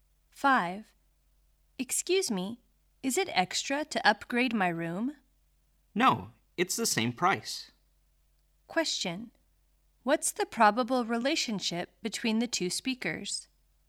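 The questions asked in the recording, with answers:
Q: What's the probable relationship between the two speakers?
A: Hotel guest and receptionist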